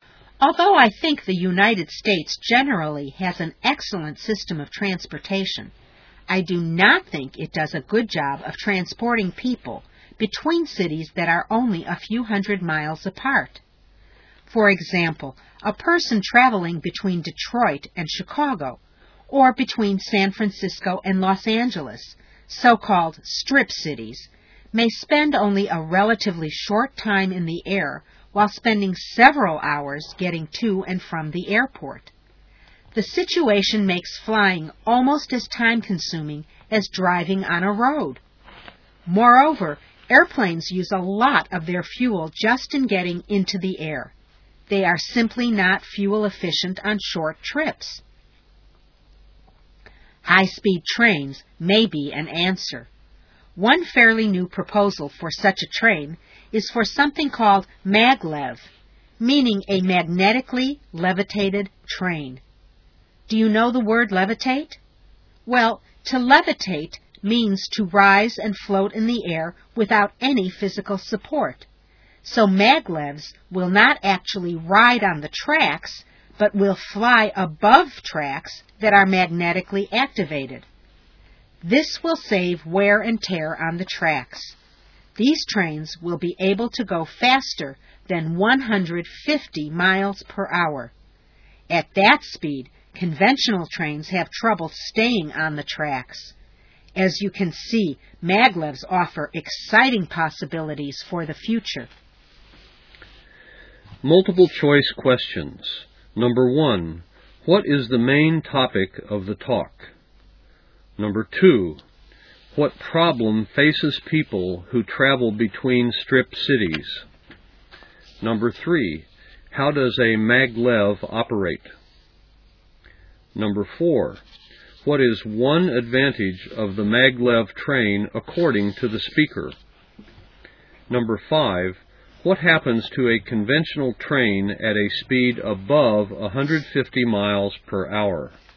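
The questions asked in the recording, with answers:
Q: what is the main topic of the talk?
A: High-speed maglev trains as a solution for travel between nearby cities

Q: what problem faces people who travel between strip cities?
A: They spend several hours getting to and from the airport, so flying takes almost as long as driving

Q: how does a maglev operate?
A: It floats above magnetically activated tracks

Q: what is one advantage of the maglev train according to the speaker?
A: It saves wear and tear on the tracks

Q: what happens to a conventional train at a speed above 150 miles per hour?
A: It has trouble staying on the tracks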